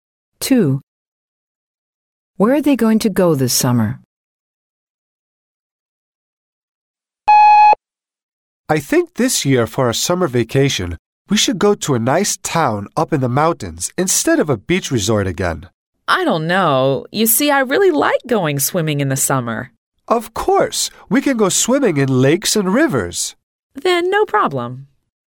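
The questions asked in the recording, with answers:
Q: Where are they going to go this summer?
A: To a town in the mountains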